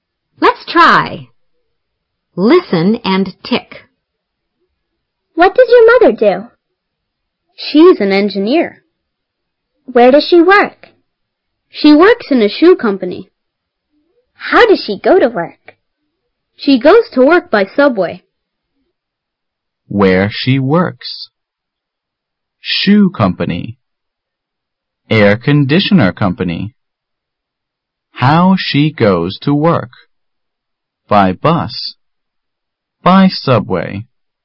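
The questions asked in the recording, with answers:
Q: Where she works?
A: Shoe company

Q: How she goes to work?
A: By subway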